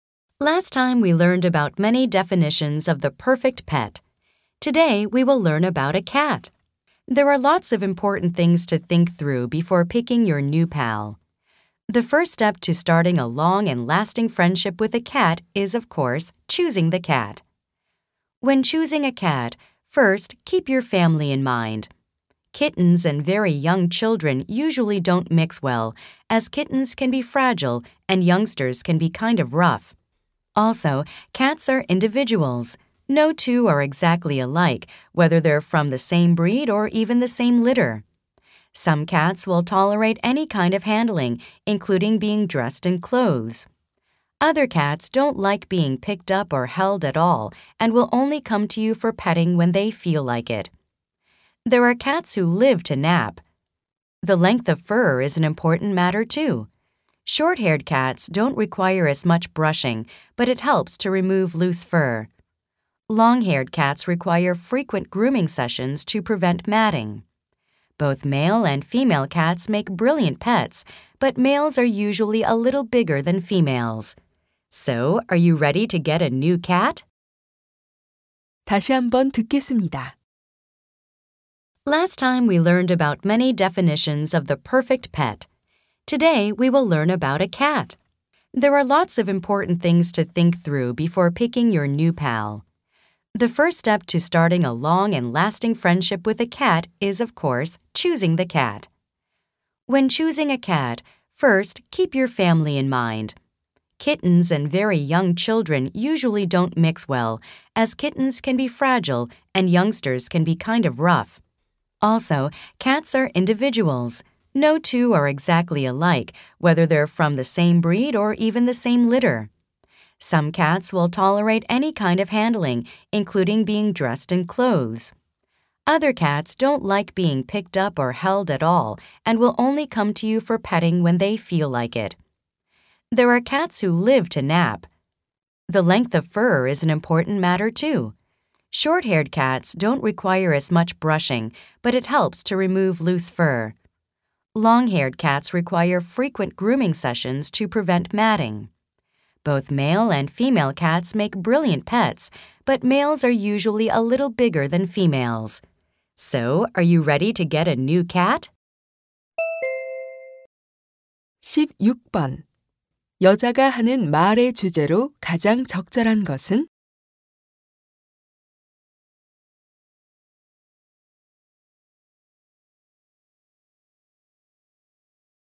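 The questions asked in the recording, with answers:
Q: 여자가 하는 말의 주제로 가장 적절한 것은?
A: 고양이를 고를 때 고려할 사항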